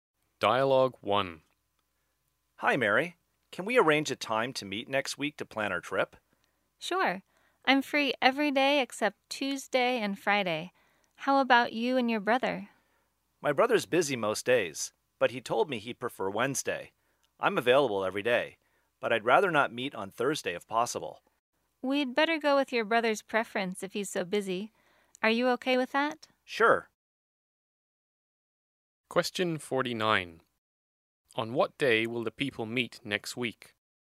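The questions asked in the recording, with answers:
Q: On what day will the people meet next week?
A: Wednesday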